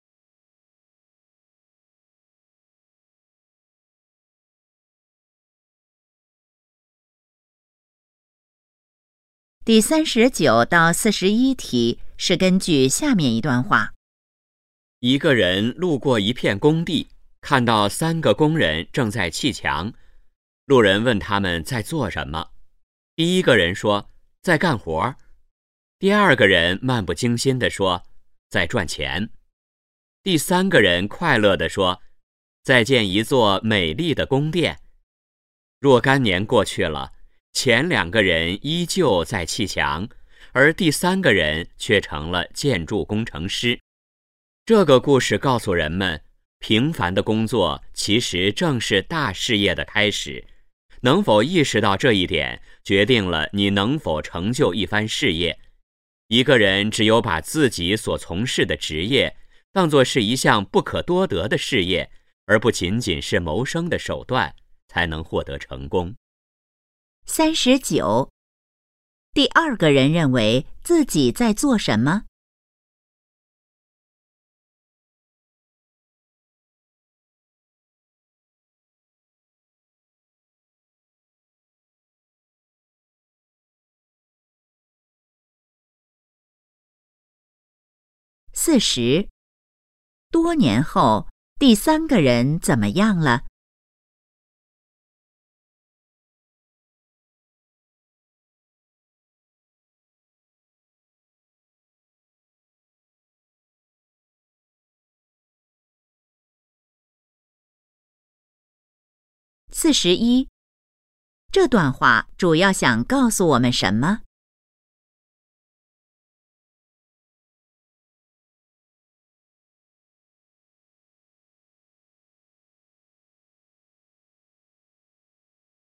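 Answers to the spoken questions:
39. 在赚钱
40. 成了建筑工程师
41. 平凡的工作是大事业的开始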